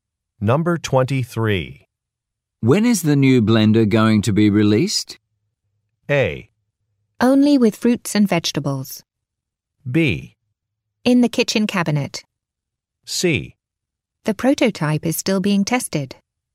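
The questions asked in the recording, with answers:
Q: When is the new blender going to be released?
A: C: The prototype is still being tested.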